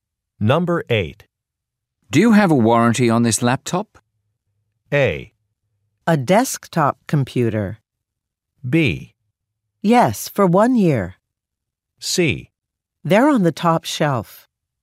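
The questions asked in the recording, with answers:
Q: Do you have a warranty on this laptop?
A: B: Yes, for 1 year.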